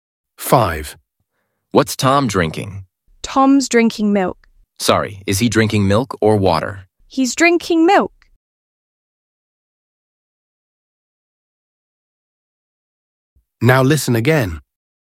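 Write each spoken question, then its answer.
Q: What's Tom drinking?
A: milk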